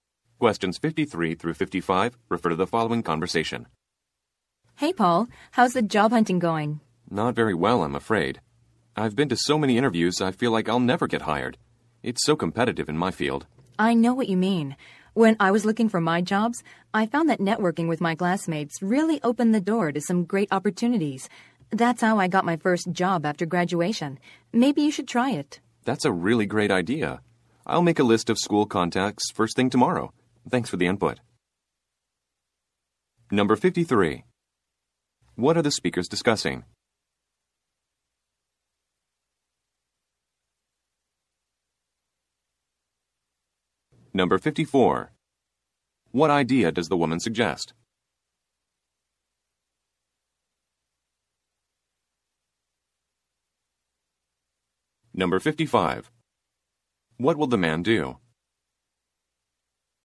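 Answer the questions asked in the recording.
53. Job hunting
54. Networking with classmates
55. Make a list of school contacts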